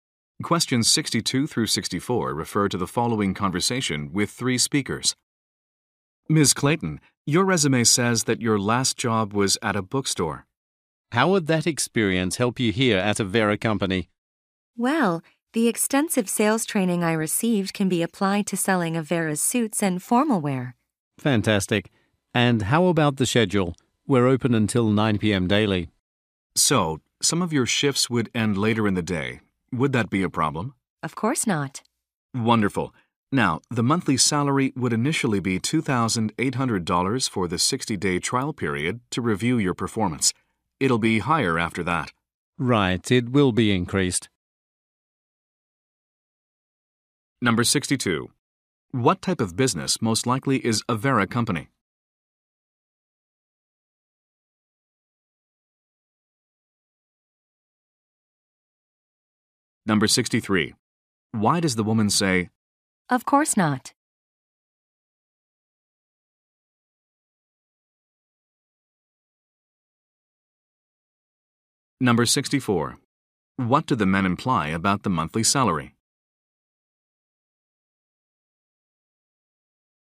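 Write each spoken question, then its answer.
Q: What type of business most likely is Avera Company?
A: A clothing store selling suits and formal wear

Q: What do the men imply about the monthly salary?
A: It will go up after the 60-day trial period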